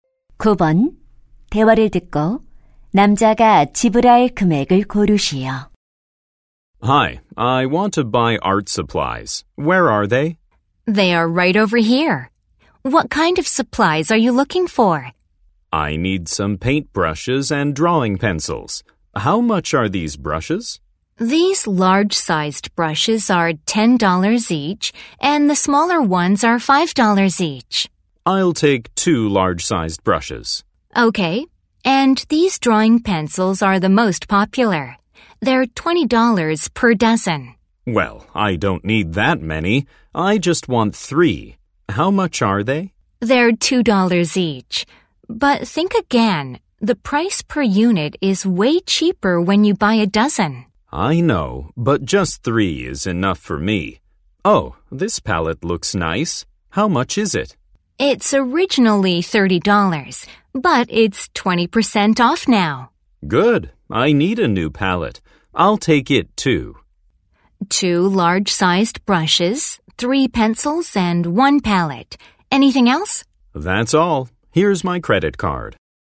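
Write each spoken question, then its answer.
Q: 대화를 듣고 남자가 지불할 금액을 고르시오.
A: $50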